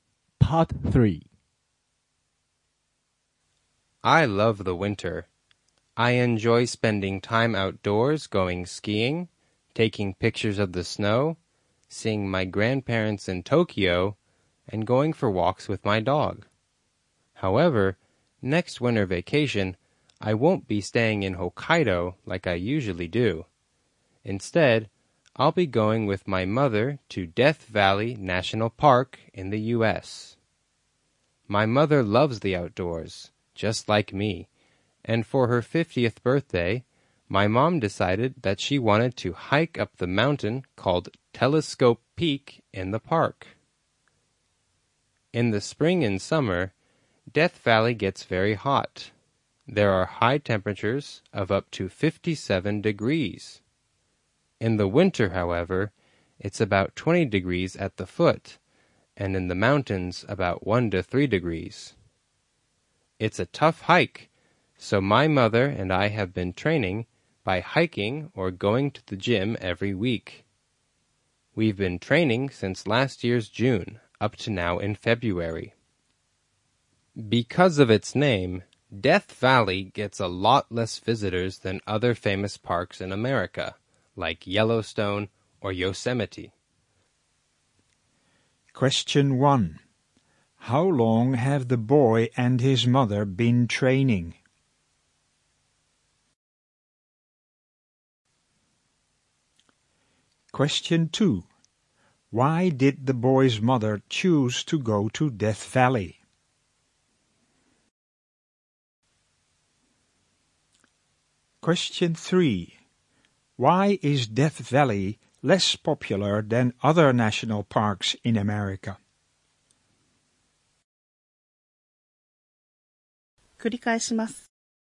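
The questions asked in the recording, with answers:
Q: How long have the boy and his mother been training?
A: About eight months (since last June)

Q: Why did the boy's mother choose to go to Death Valley?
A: For her 50th birthday she wanted to hike up Telescope Peak

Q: Why is Death Valley less popular than other national parks in America?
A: Because of its name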